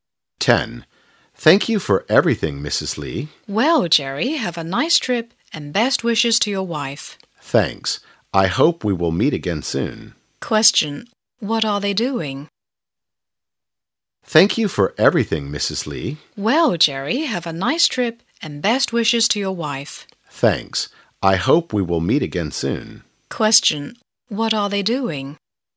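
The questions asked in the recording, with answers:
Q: What are they doing?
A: Saying goodbye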